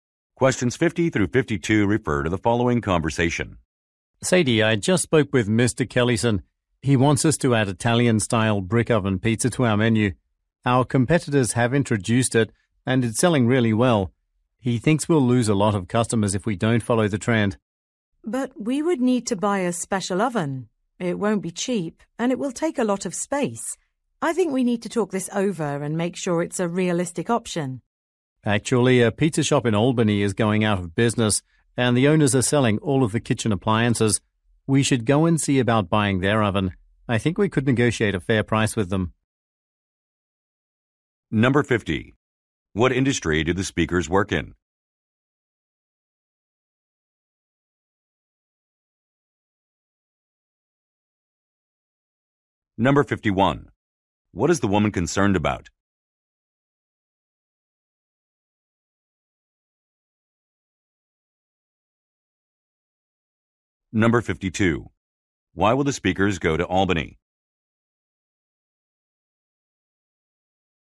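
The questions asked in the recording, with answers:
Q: What industry do the speakers work in?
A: Restaurant/food service.

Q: What is the woman concerned about?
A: The oven's cost and the space it takes.

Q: Why will the speakers go to Albany?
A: To look into buying an oven from a pizza shop that is closing.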